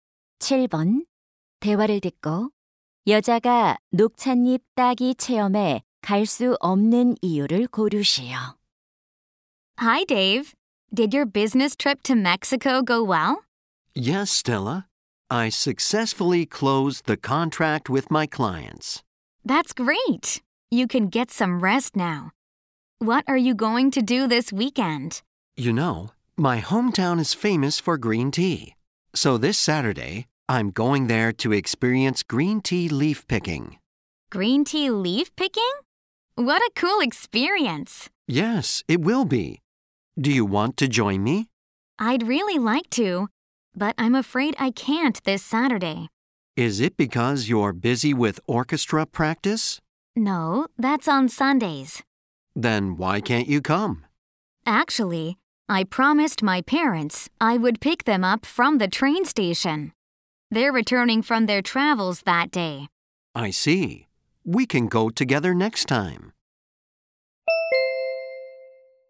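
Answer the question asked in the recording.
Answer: 기차역에서 부모님을 모셔 와야 해서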